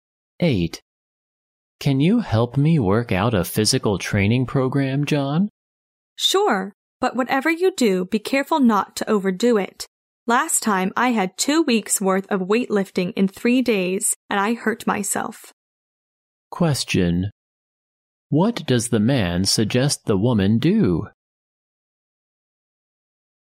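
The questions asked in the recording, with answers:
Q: What does the man suggest the woman do?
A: Not overdo the physical training.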